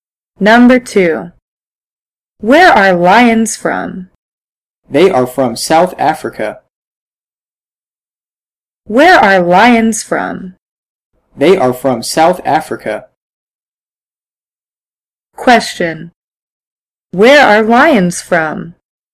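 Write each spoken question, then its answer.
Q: Where are lions from?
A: South Africa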